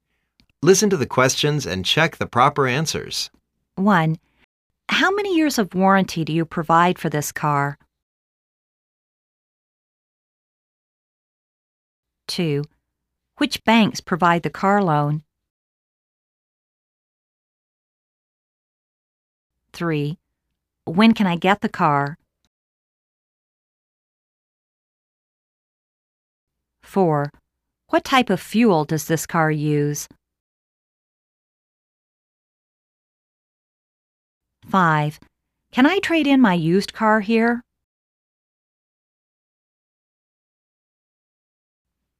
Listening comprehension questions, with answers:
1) How many years of warranty do you provide for this car?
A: 3 years.

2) Which banks provide the car loan?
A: HK Bank provides 2.5% interest car loan package.

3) When can I get the car?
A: About two weeks later the contract is signed.

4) What type of fuel does this car use?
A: We suggest you use unleaded petrol.

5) Can I trade in my used car here?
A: Sure, we usually offer the best price to buy the customer's used car.